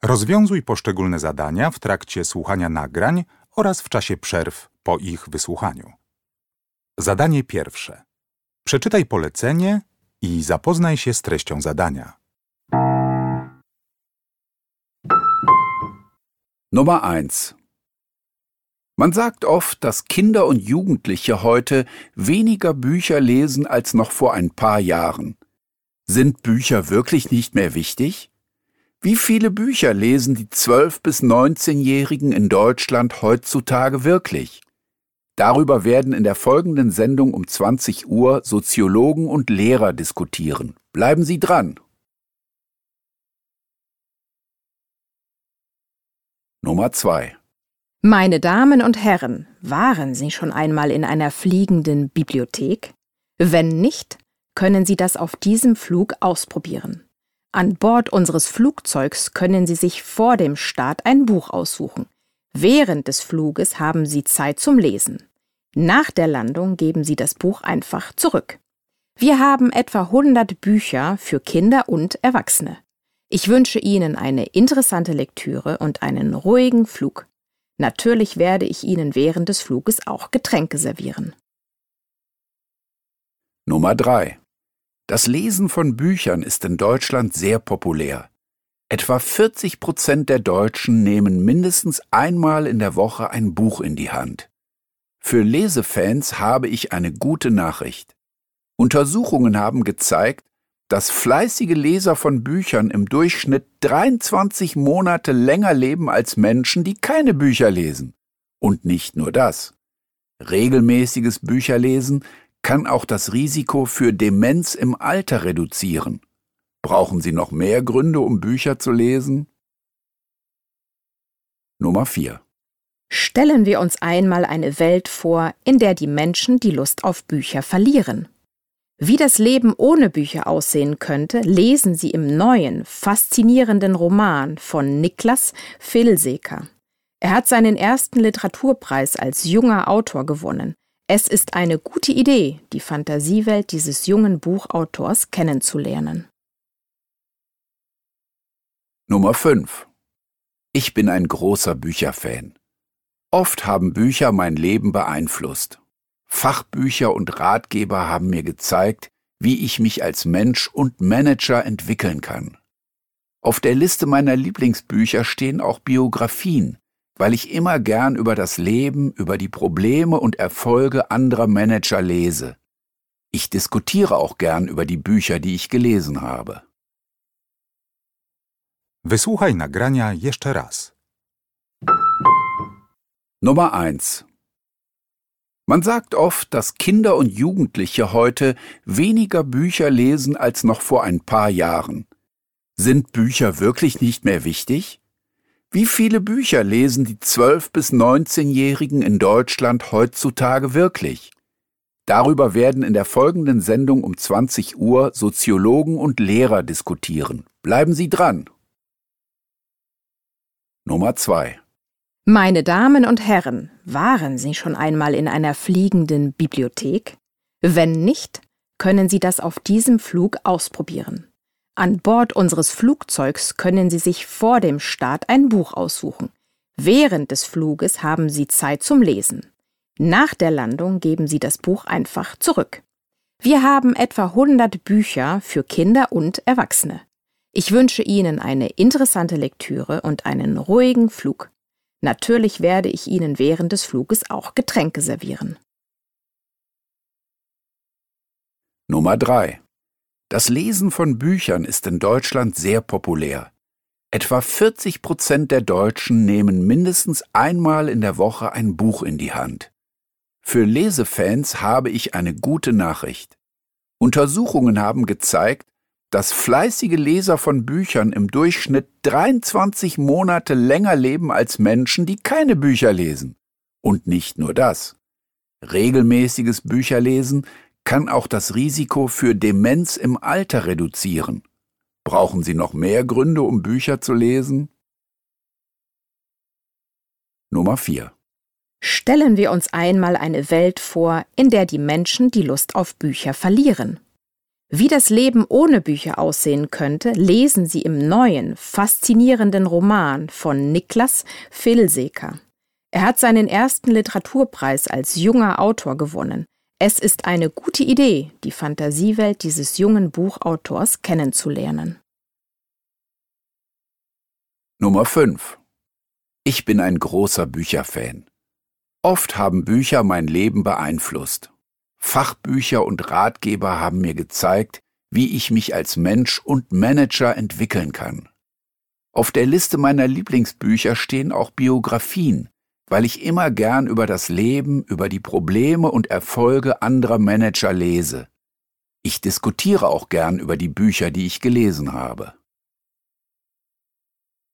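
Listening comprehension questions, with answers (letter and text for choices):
Uruchamiając odtwarzacz z oryginalnym nagraniem CKE usłyszysz dwukrotnie pięć wypowiedzi dotyczących książek. Do każdej wypowiedzi (1.1.–1.5.) dopasuj odpowiadające jej zdanie (A–F).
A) Diese Person ist Stewardess/Steward.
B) Diese Person empfiehlt ein interessantes Buch.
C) Diese Person erklärt, warum man Bücher lesen sollte.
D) Diese Person spricht über die Rolle von Büchern in ihrem Leben.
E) Diese Person gibt Tipps, welche Bücher man Kindern schenken kann.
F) Diese Person sagt eine Diskussion über den Bücherkonsum von Jugendlichen an.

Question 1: Nummer 1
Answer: F) Diese Person sagt eine Diskussion über den Bücherkonsum von Jugendlichen an.

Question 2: Nummer 2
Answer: A) Diese Person ist Stewardess/Steward.

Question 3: Nummer 3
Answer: C) Diese Person erklärt, warum man Bücher lesen sollte.

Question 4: Nummer 4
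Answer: B) Diese Person empfiehlt ein interessantes Buch.

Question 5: Nummer 5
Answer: D) Diese Person spricht über die Rolle von Büchern in ihrem Leben.

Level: Poziom: podstawowy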